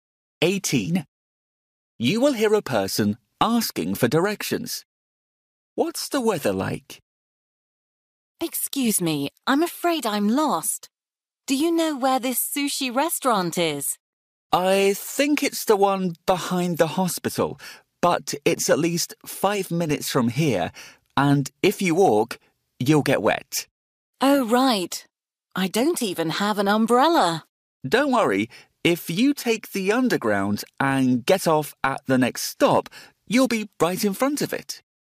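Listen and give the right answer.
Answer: It's raining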